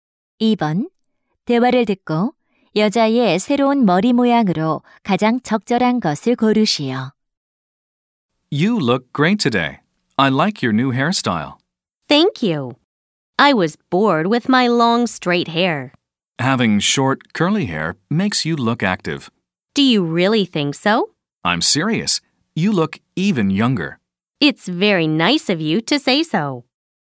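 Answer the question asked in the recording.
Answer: 짧은 곱슬머리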